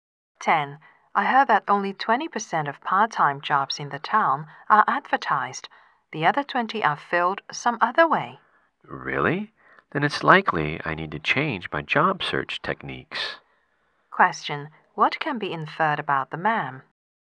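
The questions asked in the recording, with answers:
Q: What can be inferred about the man?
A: He needs to change how he looks for a job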